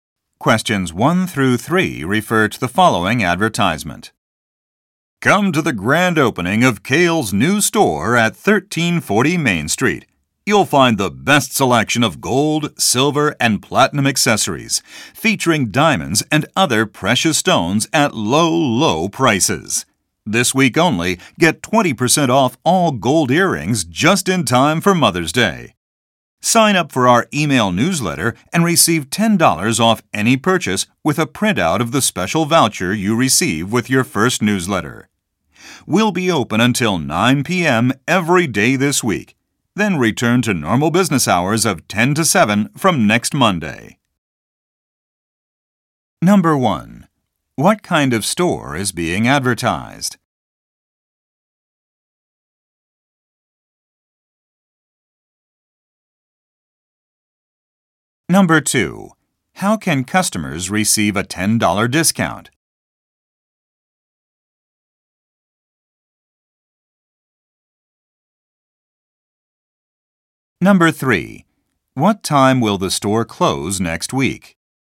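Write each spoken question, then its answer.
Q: What kind of store is being advertised?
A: A jewelry store

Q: How can customers receive a $10 discount?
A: By signing up for the email newsletter and printing the voucher

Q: What time will the store close next week?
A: 7 p.m.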